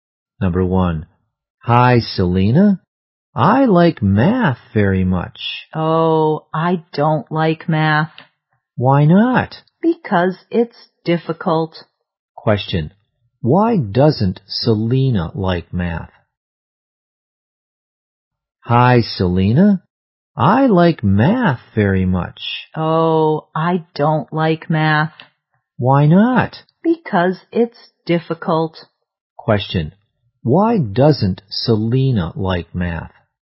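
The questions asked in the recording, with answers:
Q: Why doesn't Selena like math?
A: Because it's difficult.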